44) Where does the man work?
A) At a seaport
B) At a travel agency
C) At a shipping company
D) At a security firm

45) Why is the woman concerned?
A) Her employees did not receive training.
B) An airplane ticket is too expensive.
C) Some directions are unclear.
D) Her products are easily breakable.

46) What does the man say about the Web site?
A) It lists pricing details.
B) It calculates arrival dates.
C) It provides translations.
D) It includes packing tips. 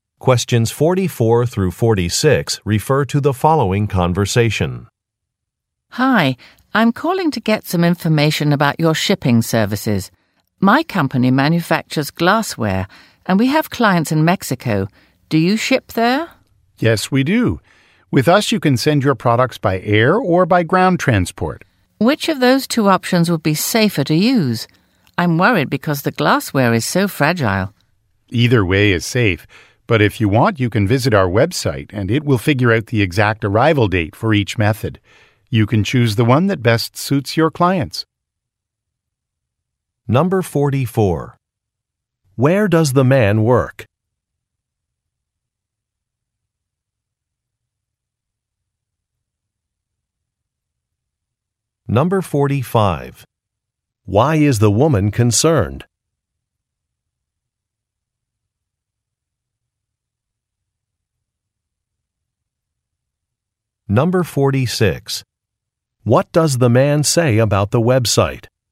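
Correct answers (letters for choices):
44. C
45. D
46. B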